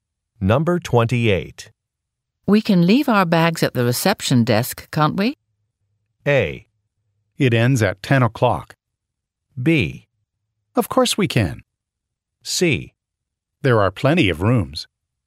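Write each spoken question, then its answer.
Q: We can leave our bags at the reception desk, can't we?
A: B: Of course we can.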